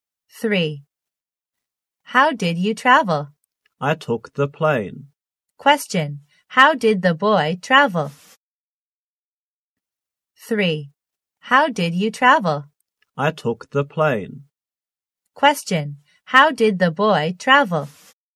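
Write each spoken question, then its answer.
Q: How did the boy travel?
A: By plane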